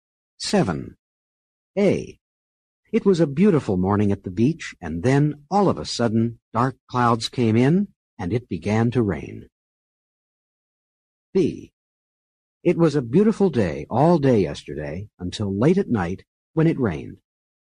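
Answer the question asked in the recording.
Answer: different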